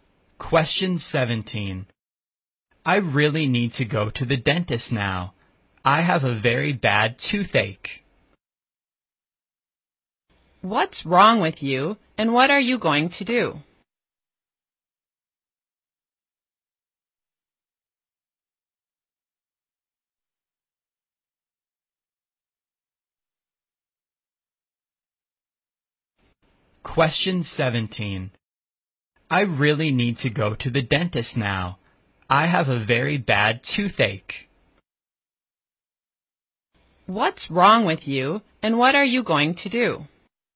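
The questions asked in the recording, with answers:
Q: What's wrong with you, and what are you going to do?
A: I have a bad toothache; I'm going to the dentist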